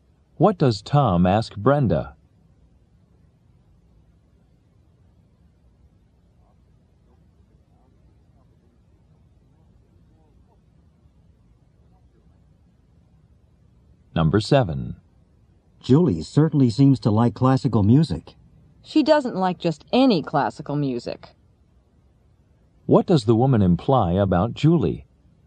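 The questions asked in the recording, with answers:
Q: What does the woman imply about Julie?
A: She likes only certain kinds of classical music.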